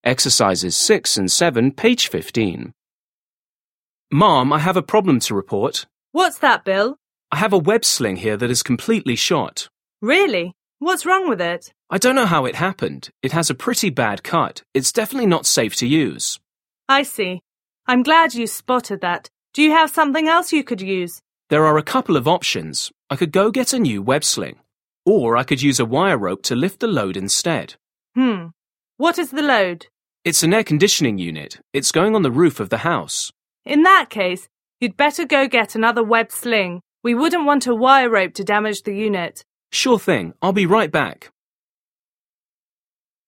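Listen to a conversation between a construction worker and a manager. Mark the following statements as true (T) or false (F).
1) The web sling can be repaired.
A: F

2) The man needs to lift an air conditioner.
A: T

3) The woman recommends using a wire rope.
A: F

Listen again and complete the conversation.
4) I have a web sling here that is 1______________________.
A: completely shot

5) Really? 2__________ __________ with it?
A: What's wrong

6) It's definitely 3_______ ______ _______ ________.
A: not safe to use

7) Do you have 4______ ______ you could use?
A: something else

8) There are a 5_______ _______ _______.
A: couple of options

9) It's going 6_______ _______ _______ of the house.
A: on the roof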